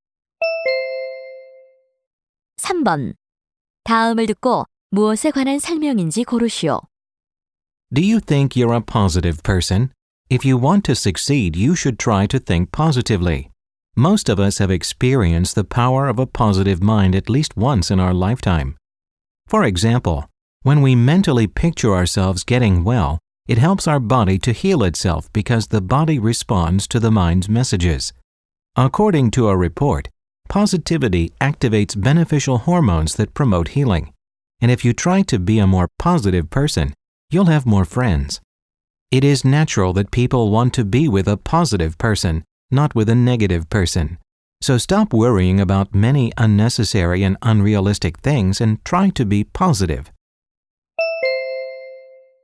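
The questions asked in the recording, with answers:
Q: 다음을 듣고 무엇에 관한 설명인지 고르시오.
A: 긍정적 사고의 힘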